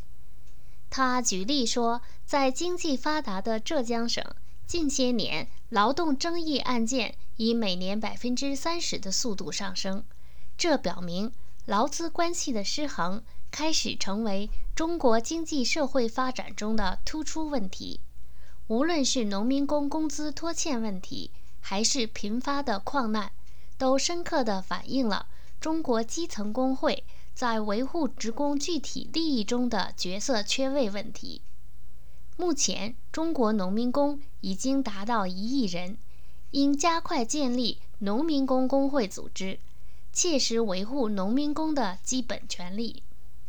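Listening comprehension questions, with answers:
目前中国有多少农民工?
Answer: 1亿人

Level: 3rd Year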